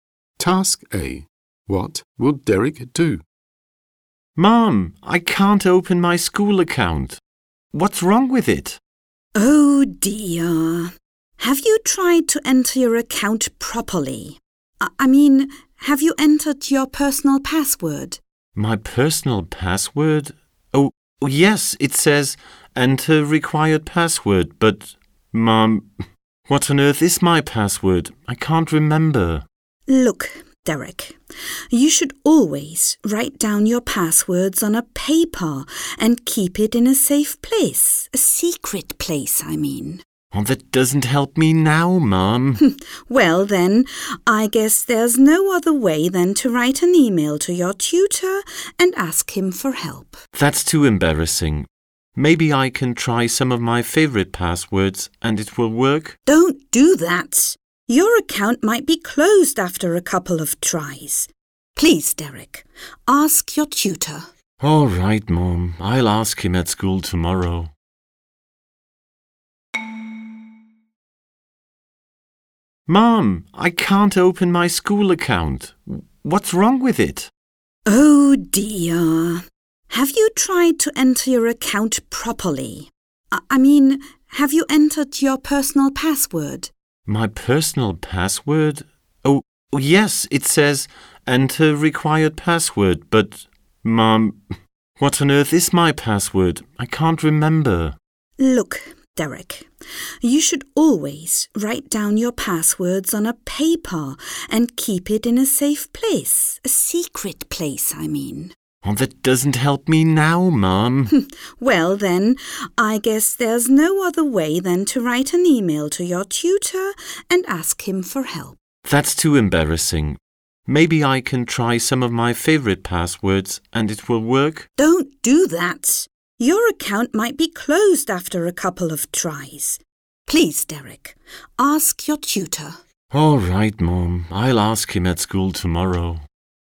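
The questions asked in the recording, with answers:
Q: What will Derek do?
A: Ask his tutor for help at school tomorrow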